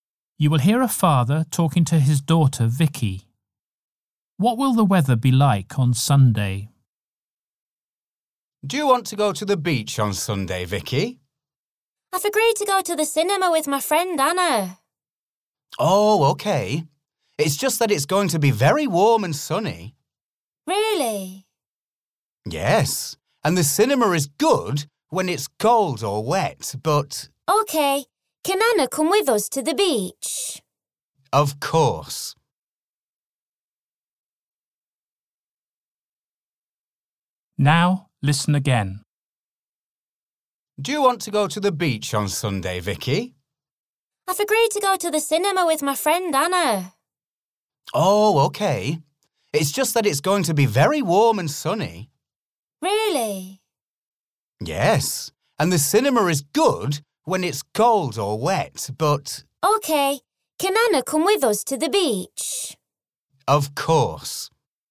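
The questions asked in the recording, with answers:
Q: What will the weather be like on Sunday?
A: Very warm and sunny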